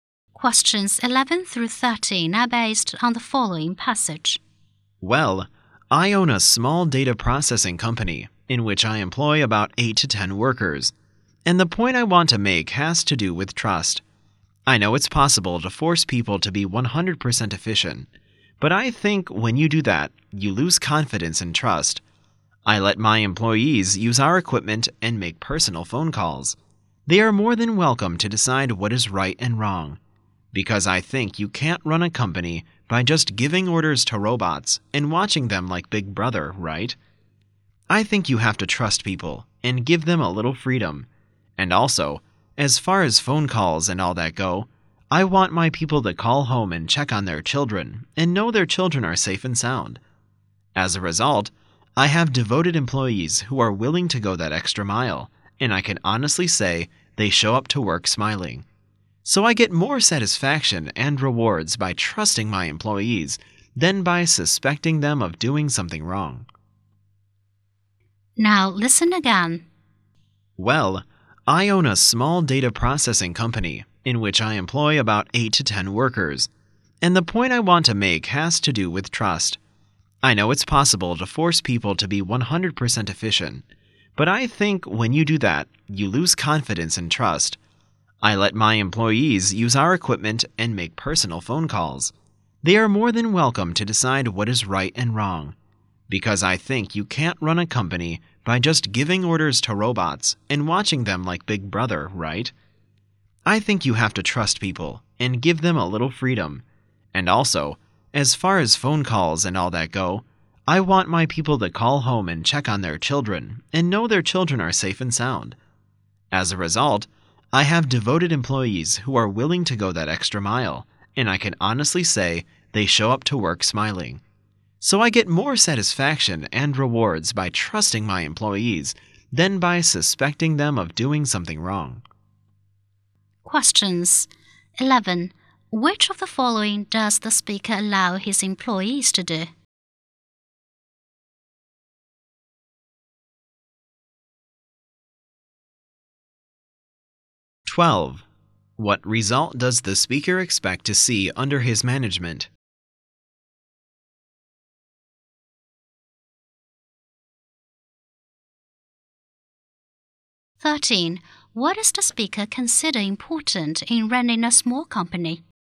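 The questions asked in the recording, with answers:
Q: Which of the following does the speaker allow his employees to do?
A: Use the equipment and make personal phone calls

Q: What result does the speaker expect to see under his management?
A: Devoted employees who come to work smiling

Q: What does the speaker consider important in running a small company?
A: Trust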